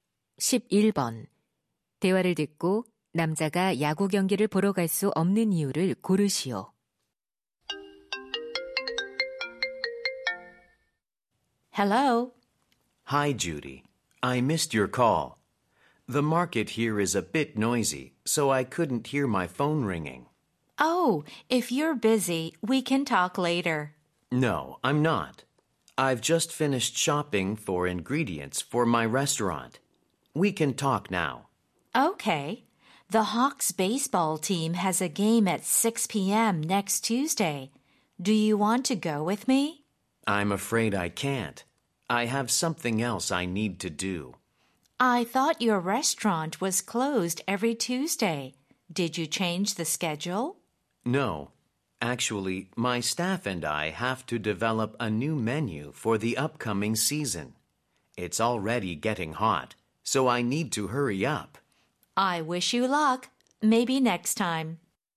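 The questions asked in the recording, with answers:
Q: 대화를 듣고 남자가 야구 경기를 보러 갈 수 없는 이유를 고르시오.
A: 새 메뉴를 개발해야 해서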